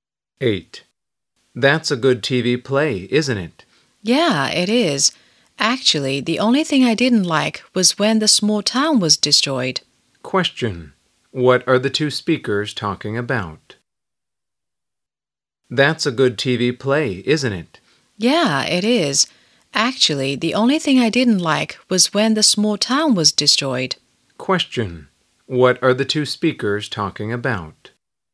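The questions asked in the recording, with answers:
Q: Question. What are the two speakers talking about?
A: A TV play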